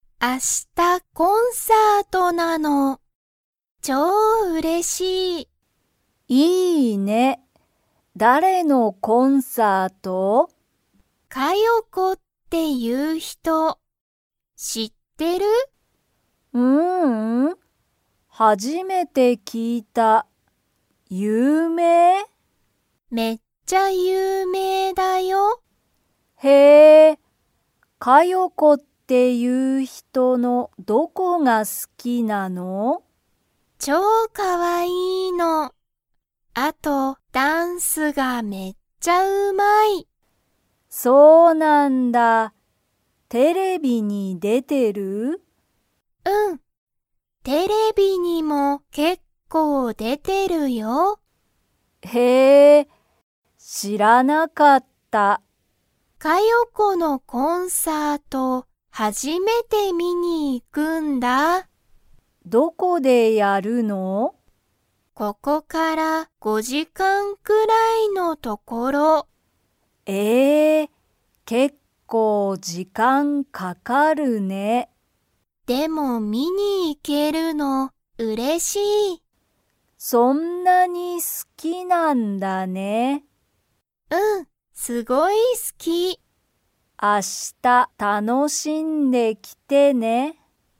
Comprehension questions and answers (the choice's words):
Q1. マオは、カヨコを知(し)っていますか?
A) はい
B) いいえ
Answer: いいえ

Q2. カヨコは、____。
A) 結構けっこう時間じかんかかる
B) テレビがすごい好(す)き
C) あまりダンスがうまくない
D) かわいくて、ダンスがうまい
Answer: かわいくて、ダンスがうまい